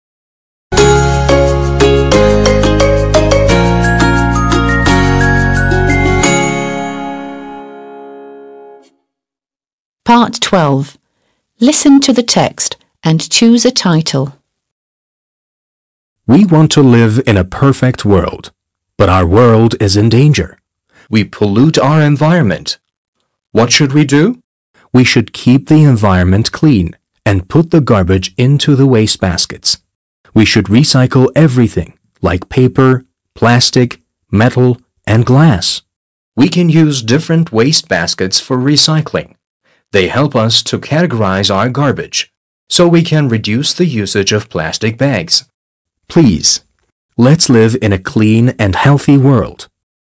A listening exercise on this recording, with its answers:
12. Listen to the text and choose a title.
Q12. Listen to the text and choose a title.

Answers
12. The importance of recycling.

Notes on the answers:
metnin çoğu geri dönüşüm eylemlerinden bahsediyor.

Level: 6. Sınıf